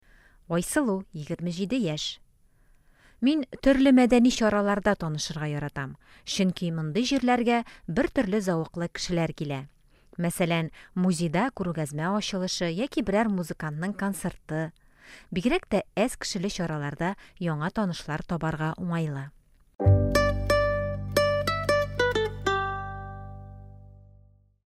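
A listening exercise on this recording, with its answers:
Бирем. Ответьте на вопросы по тексту.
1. Ни өчен Айсылу мәдәни чараларны танышу өчен яхшы урын ди?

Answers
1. Чөнки мондый җирләргә бер төрле зәвыклы кешеләр килә.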